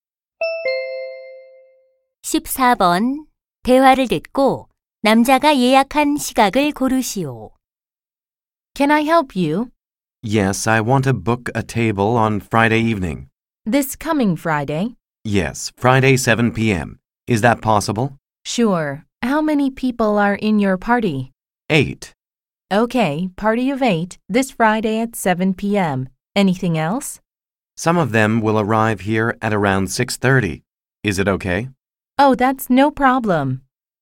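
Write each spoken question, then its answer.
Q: 대화를 듣고 남자가 예약한 시각을 고르시오.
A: 오후 7시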